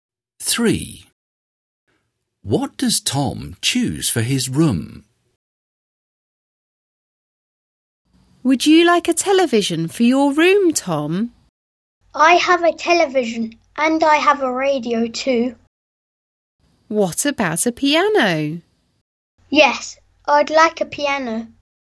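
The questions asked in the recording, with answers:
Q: What does Tom choose for his room?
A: A piano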